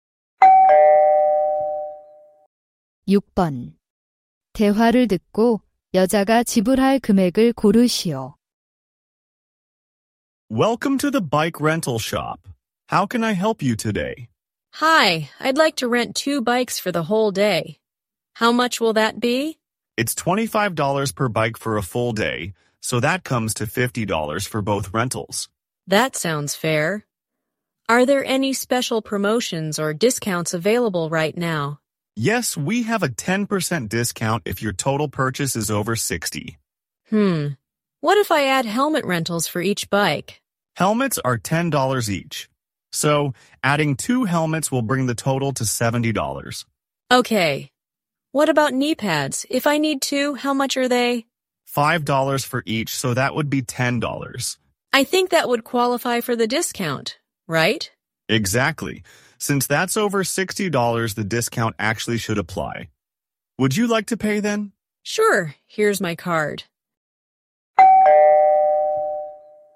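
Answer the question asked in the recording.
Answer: $72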